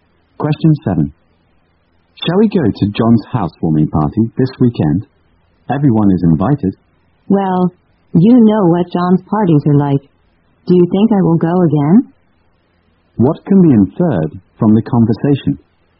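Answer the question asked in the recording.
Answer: The speaker doesn't want to go to John's party.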